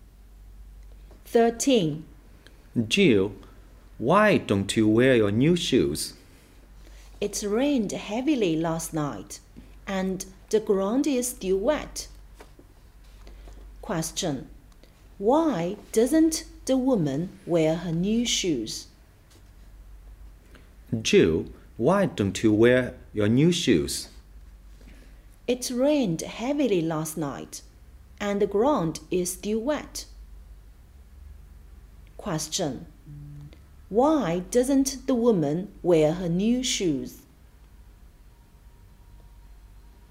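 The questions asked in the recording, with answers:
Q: Why doesn't the woman wear her new shoes?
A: Because the ground is still wet after heavy rain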